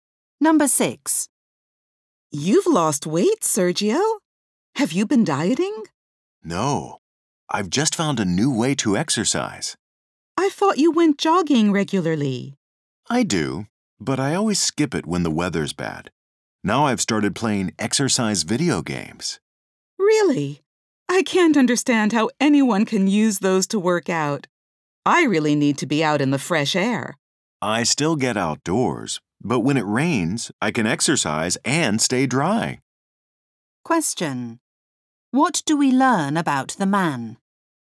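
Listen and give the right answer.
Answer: He plays exercise video games when the weather is bad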